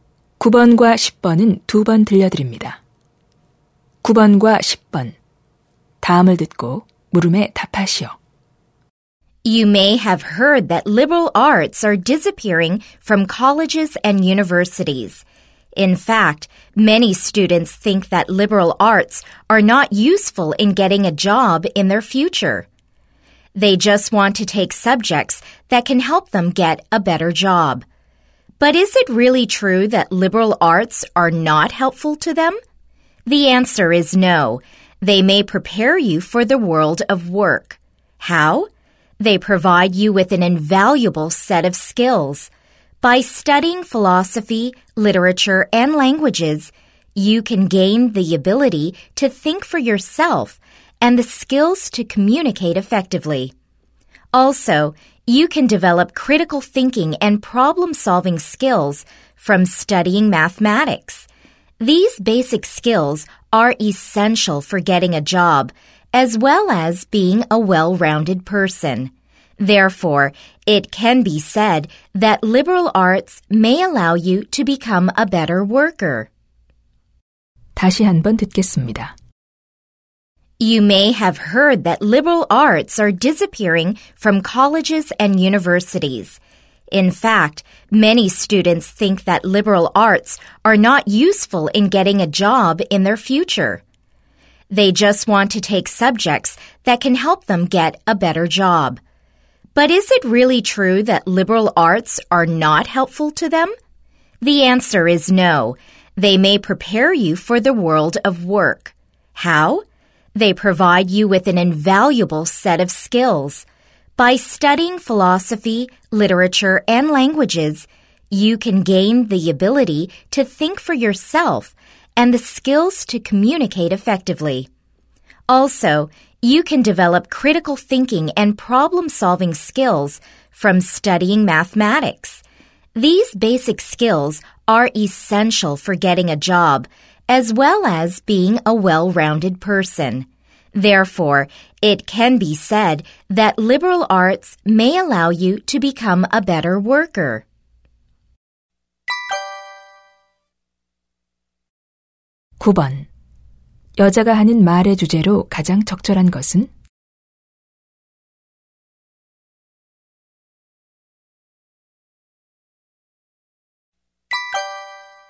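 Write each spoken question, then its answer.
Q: 여자가 하는 말의 주제로 가장 적절한 것은?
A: 교양 과목(인문학)은 취업에 필요한 기술을 길러 준다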